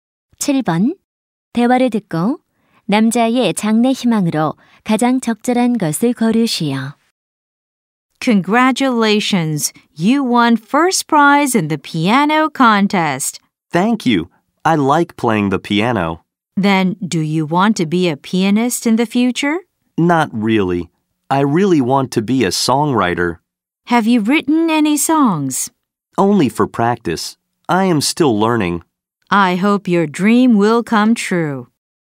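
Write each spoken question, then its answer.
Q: 대화를 듣고 남자의 장래 희망으로 가장 적절한 것을 고르시오.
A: 작곡가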